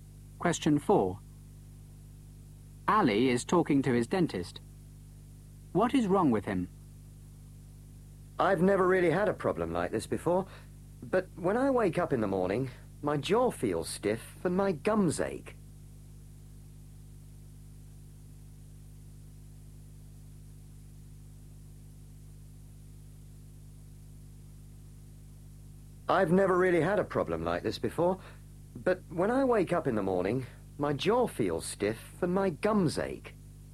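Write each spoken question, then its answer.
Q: What is wrong with him?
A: His jaw feels stiff and his gums ache in the morning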